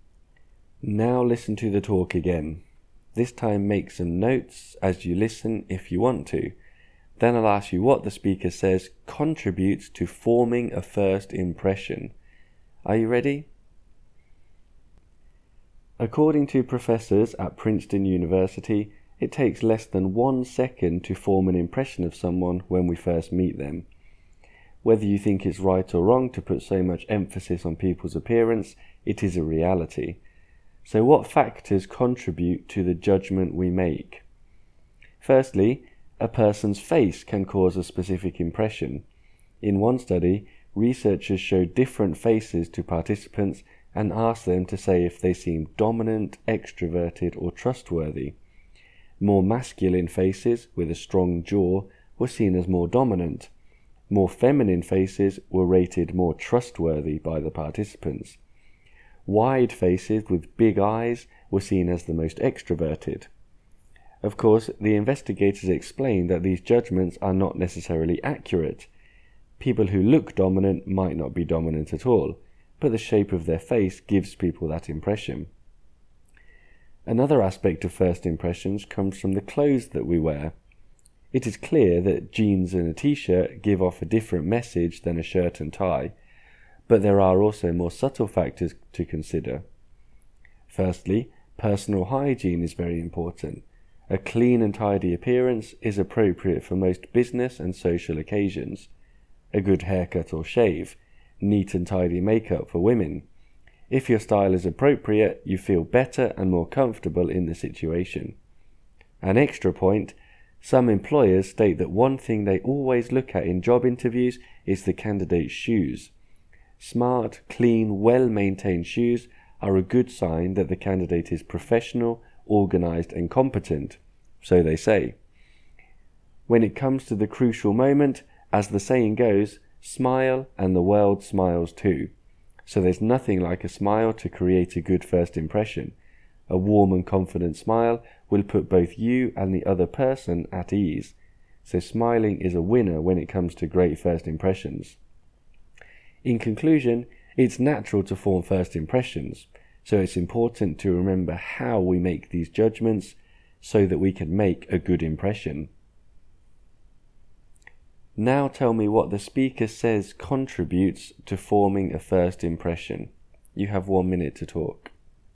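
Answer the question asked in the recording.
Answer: The shape of a person's face, their clothes and grooming (including hygiene and shoes), and smiling.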